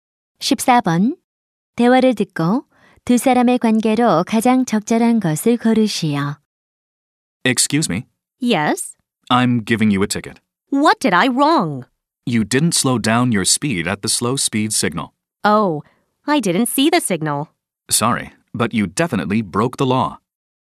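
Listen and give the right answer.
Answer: 경찰관과 운전자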